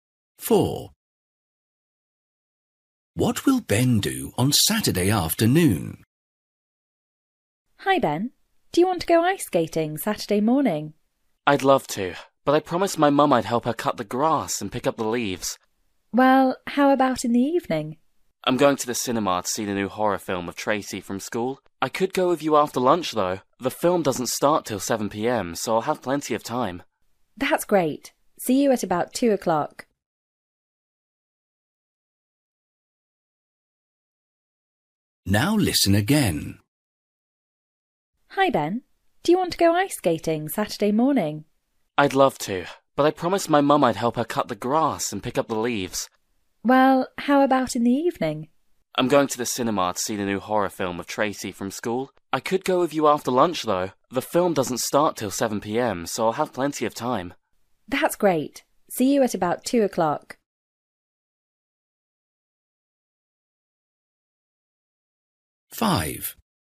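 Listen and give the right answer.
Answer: Go ice skating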